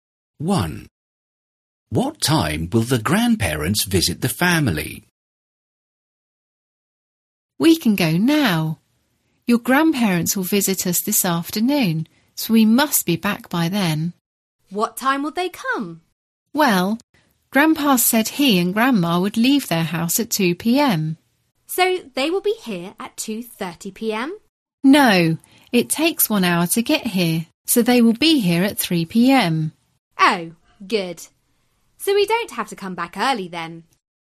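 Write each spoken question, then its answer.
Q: What time will the grandparents visit the family?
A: 3 p.m.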